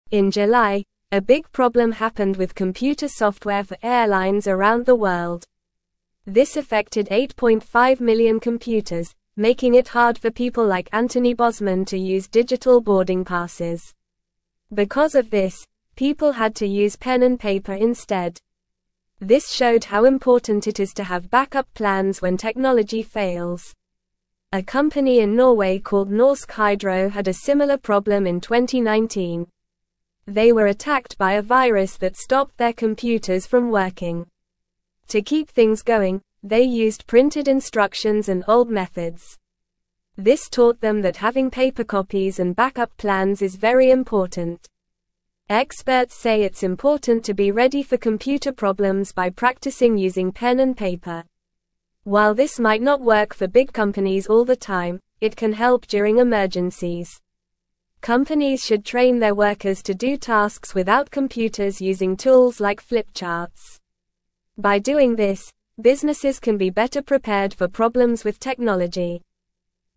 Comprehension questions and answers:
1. This affected 8.5 million (1)______, (2)______ it hard for people like Anthony Bosman to use digital boarding (3)______.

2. This affected 8.5 million (1)______, (2)______ it hard for people like Anthony Bosman to use digital boarding (3)______.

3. This affected 8.5 million (1)______, (2)______ it hard for people like Anthony Bosman to use digital boarding (3)______.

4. This (4)______ how (5)______ it is to have backup plans when technology fails.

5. This (4)______ how (5)______ it is to have backup plans when technology fails.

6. A company in Norway called Norsk Hydro had a similar (6)______ in 2019.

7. This taught them that having paper (7)______ and backup plans is very important.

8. Experts say it's important to be (8)______ for (9)______ problems by practicing using pen and paper.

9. Experts say it's important to be (8)______ for (9)______ problems by practicing using pen and paper.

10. While this might not work for big (10)______ all the time, it can help during emergencies.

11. By doing this, (11)______ can be better prepared for (12)______ with technology.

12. By doing this, (11)______ can be better prepared for (12)______ with technology.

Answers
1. computers
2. making
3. passes
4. showed
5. important
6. problem
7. copies
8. ready
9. computer
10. companies
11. businesses
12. problems

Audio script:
In July, a big problem happened with computer software for airlines around the world. This affected 8.5 million computers, making it hard for people like Anthony Bosman to use digital boarding passes. Because of this, people had to use pen and paper instead. This showed how important it is to have backup plans when technology fails.
A company in Norway called Norsk Hydro had a similar problem in 2019. They were attacked by a virus that stopped their computers from working. To keep things going, they used printed instructions and old methods. This taught them that having paper copies and backup plans is very important.
Experts say it's important to be ready for computer problems by practicing using pen and paper. While this might not work for big companies all the time, it can help during emergencies. Companies should train their workers to do tasks without computers using tools like flipcharts. By doing this, businesses can be better prepared for problems with technology.

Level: Level 2